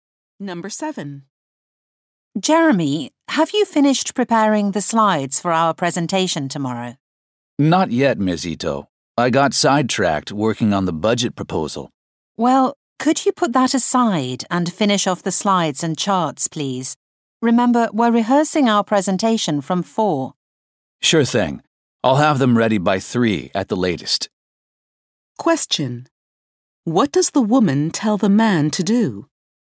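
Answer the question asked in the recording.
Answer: Put aside the budget proposal and finish the slides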